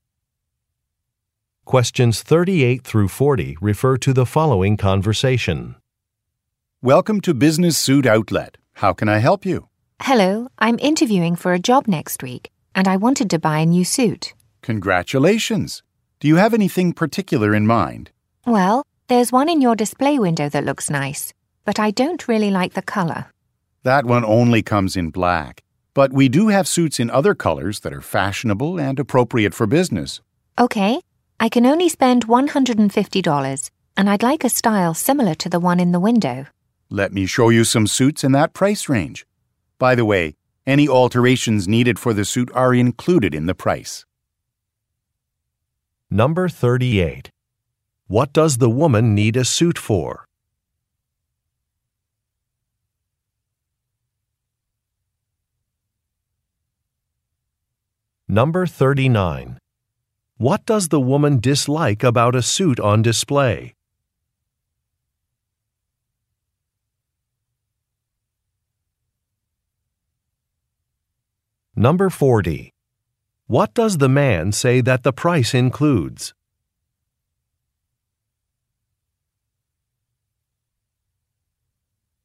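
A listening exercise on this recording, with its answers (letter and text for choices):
Question 38 - 40 refer to following conversation:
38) What does the woman need a suit for?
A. A job interview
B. A fashion show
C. A family celebration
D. A television appearance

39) What does the woman dislike about a suit on display?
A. The fabric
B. The price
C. The style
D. The color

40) What does the man say that the price includes?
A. Some accessories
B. Alterations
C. Sales tax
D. Delivery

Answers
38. A. A job interview
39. D. The color
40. B. Alterations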